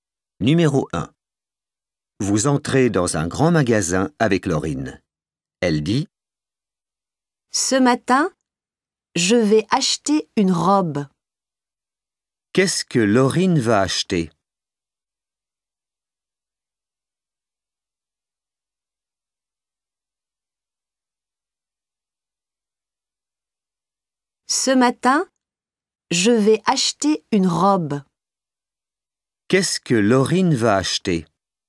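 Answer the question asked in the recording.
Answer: une robe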